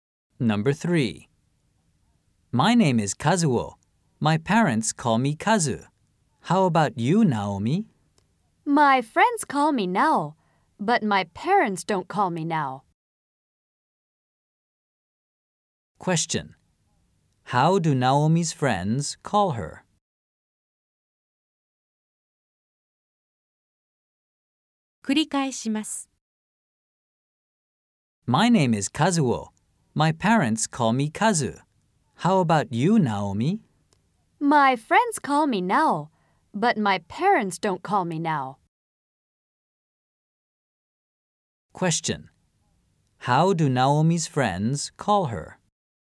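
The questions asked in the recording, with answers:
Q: How do Naomi's friends call her?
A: They call her Nao.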